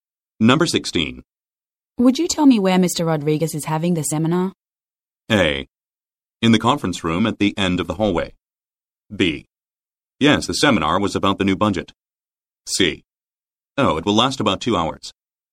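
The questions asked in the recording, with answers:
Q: Would you tell me where Mr. Rodriguez is having the seminar?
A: A: In the conference room at the end of the hallway.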